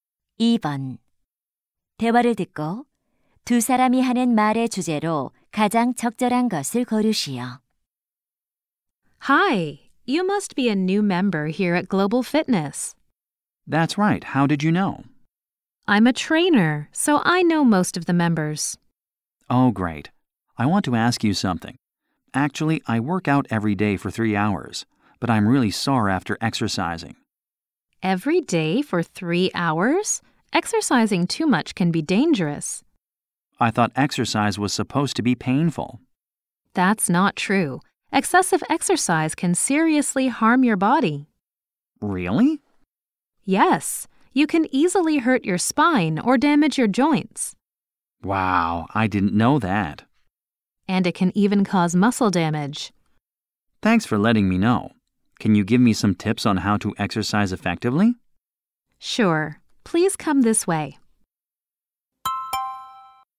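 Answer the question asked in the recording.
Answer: 과도한 운동의 위험성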